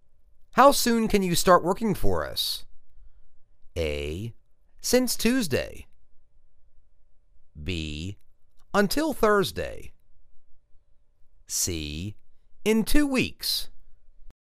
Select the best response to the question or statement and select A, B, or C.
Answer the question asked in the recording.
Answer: In two weeks.